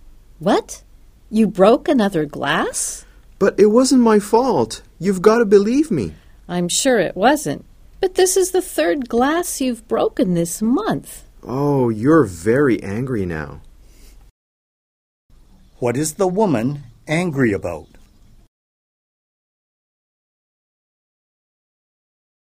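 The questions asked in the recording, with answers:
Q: What is the woman angry about?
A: He has broken a third glass this month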